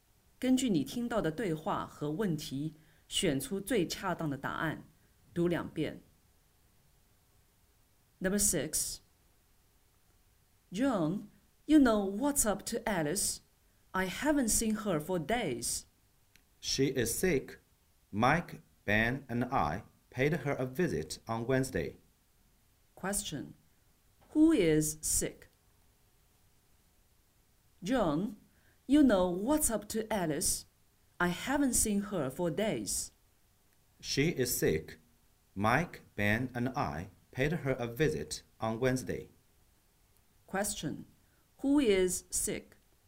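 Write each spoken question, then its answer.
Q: Who is sick?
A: Alice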